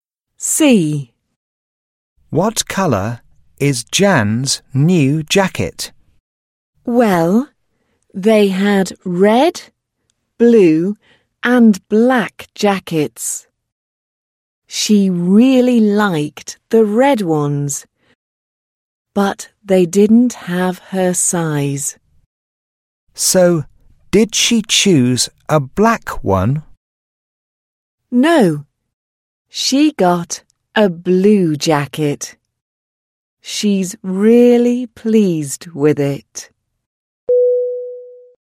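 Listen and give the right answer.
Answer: Blue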